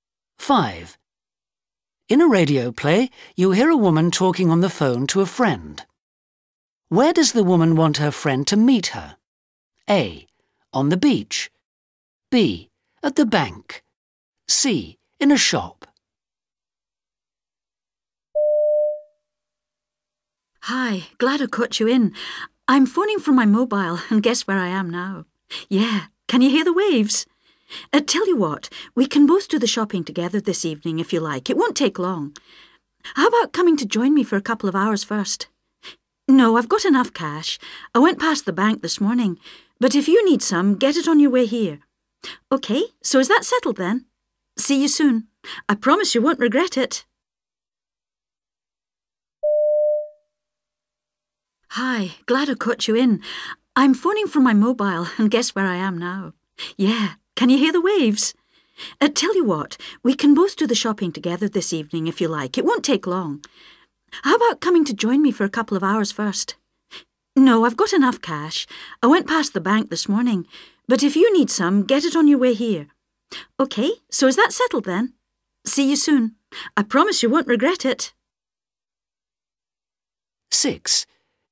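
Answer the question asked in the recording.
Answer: A: On the beach.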